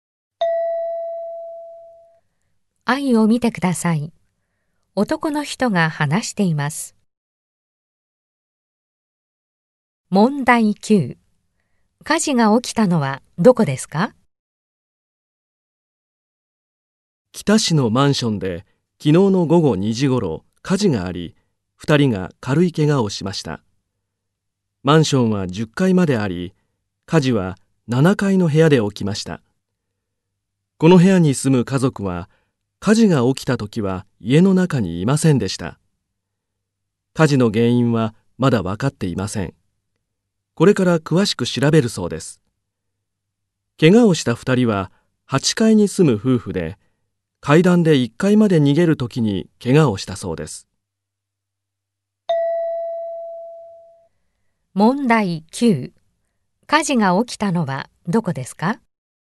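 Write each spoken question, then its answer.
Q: 火事が起きたのはどこですか?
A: マンションの7階の部屋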